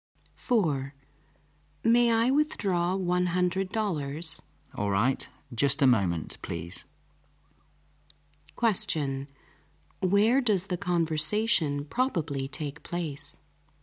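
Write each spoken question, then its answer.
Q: Where does the conversation probably take place?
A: In a bank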